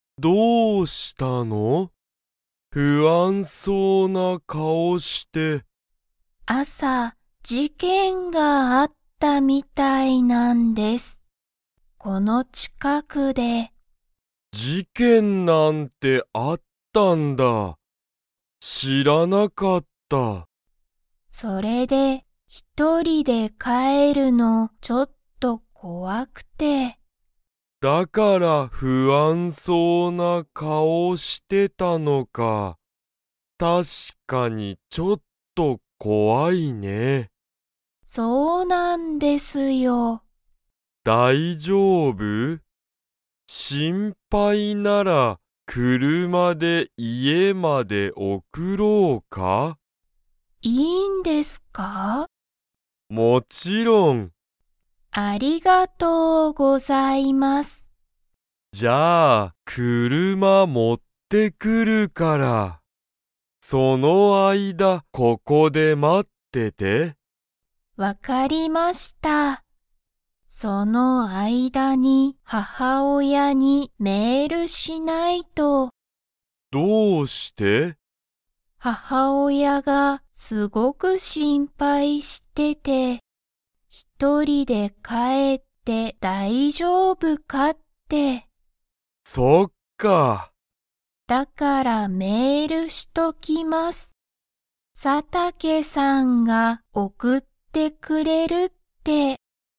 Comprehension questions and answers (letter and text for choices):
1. 朝あさ、この近ちかくで何なにがありましたか?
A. 車くるま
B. メール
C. 事件じけん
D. 親おや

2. 山田やまださんは、母親ははおやに 。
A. メールする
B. メールしない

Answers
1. C. 事件じけん
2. A. メールする

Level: Level 3